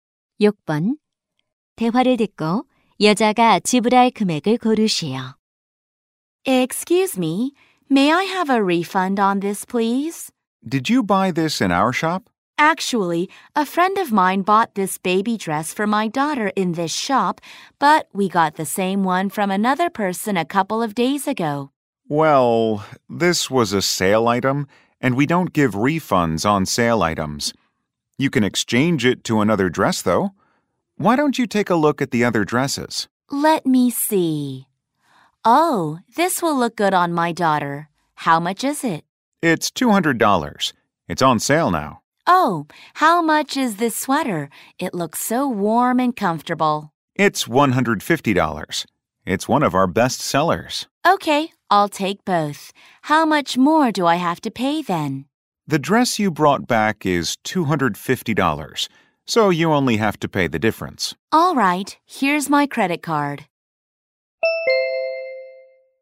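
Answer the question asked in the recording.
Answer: $100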